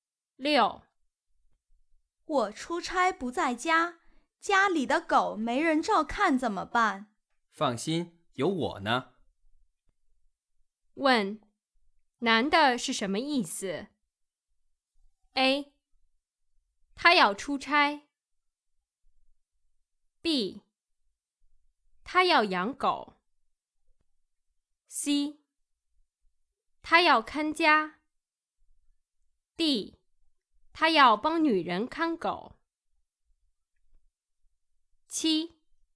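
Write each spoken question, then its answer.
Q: 问男的是什么意思? A. 他要出差 B. 他要养狗 C. 他要看家 D. 他要帮女人看狗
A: D: 他要帮女人看狗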